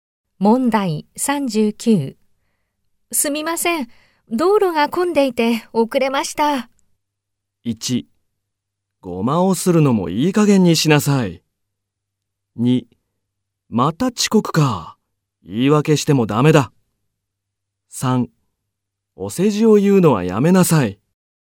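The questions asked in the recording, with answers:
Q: すみません、道路が混んでいて遅れました。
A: 2: また遅刻か。言い訳してもダメだ。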